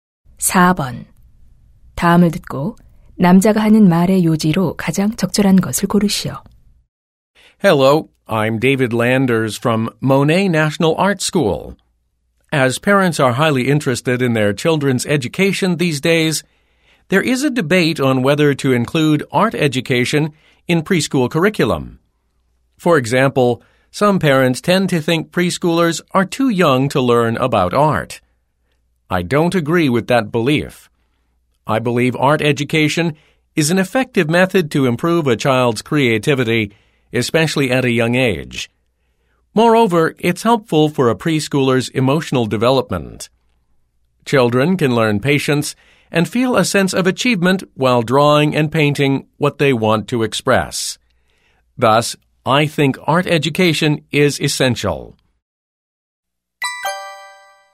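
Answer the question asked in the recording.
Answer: 미술 교육은 유아에게 필수적이다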